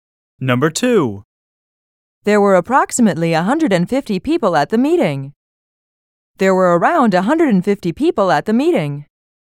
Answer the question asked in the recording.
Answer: Same is the correct answer.